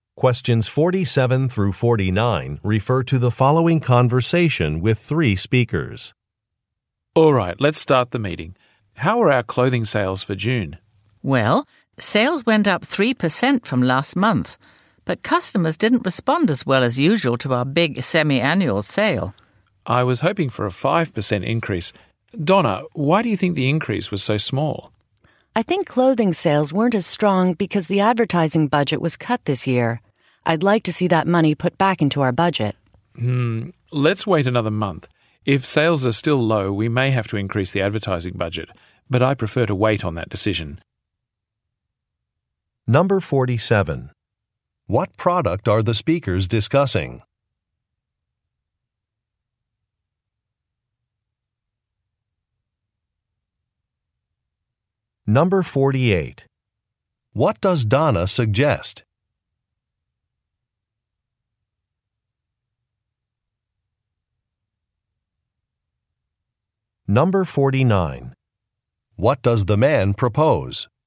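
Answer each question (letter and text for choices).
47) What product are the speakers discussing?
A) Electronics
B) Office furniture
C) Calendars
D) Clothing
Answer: D) Clothing

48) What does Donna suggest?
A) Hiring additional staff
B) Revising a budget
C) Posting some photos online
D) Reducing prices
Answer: B) Revising a budget

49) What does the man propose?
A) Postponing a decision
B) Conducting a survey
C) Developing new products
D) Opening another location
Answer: A) Postponing a decision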